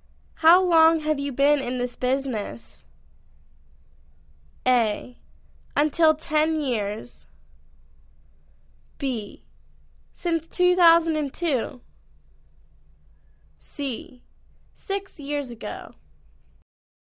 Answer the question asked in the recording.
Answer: Since 2002